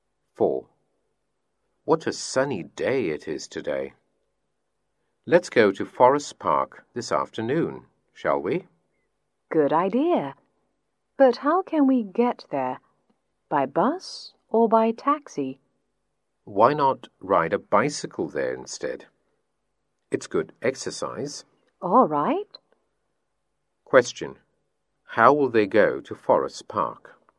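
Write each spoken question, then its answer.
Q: How will they go to Forest Park?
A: By bicycle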